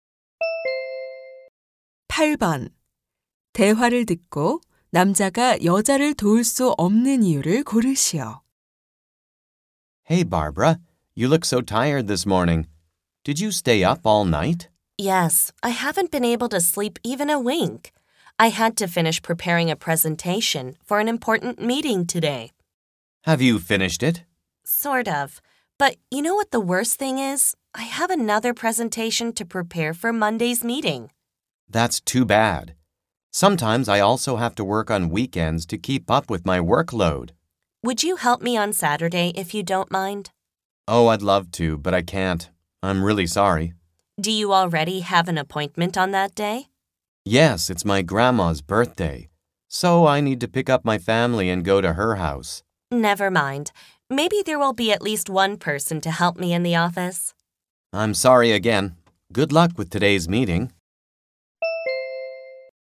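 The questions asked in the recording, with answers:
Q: 대화를 듣고 남자가 여자를 도울 수 없는 이유를 고르시오.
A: 할머니 생신이라서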